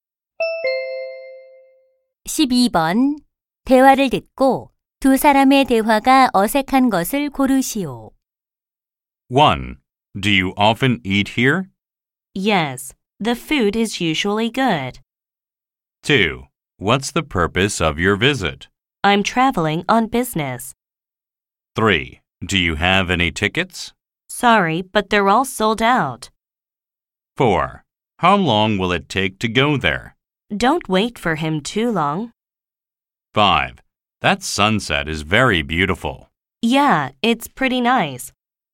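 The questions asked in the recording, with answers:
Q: 대화를 듣고 두 사람의 대화가 어색한 것을 고르시오.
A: 4: How long will it take to go there? / Don't wait for him too long.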